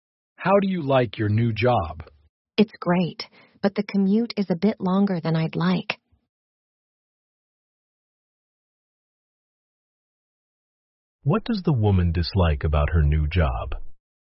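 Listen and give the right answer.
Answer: The long commute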